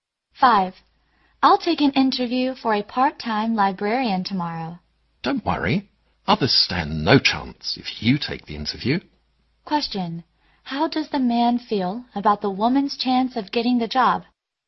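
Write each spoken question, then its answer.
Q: How does the man feel about the woman's chance of getting the job?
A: He is confident she will get it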